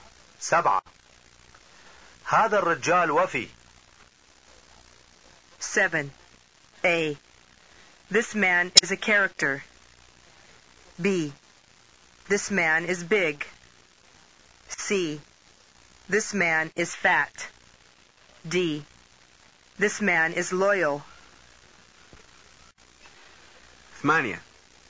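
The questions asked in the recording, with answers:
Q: سبعة. هذا الرجال وفي.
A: D: This man is loyal.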